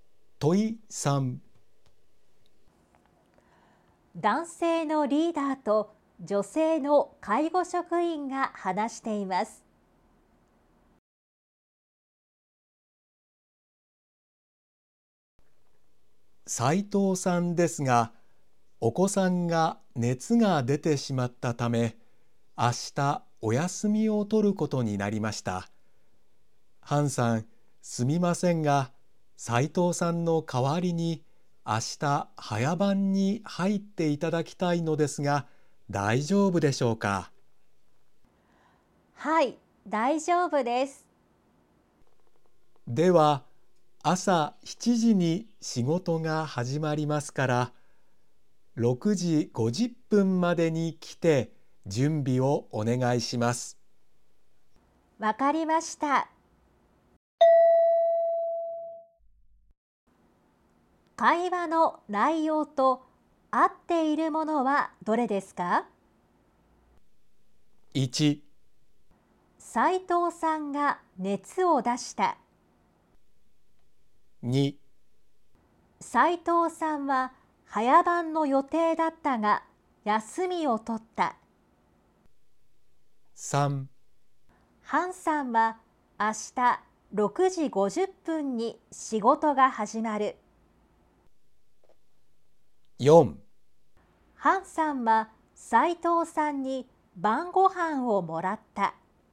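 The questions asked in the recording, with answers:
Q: 会話の内容と合っているものはどれですか?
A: 2: 斉藤さんは早番の予定だったが休みを取った。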